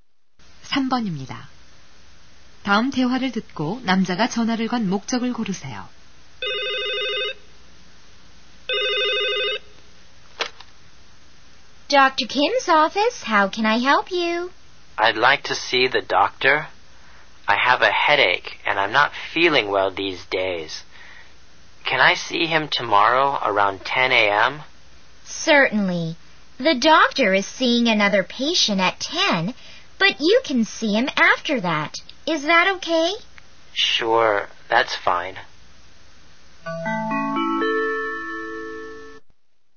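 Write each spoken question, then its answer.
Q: 다음 대화를 듣고 남자가 전화를 건 목적을 고르세요.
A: 진료 예약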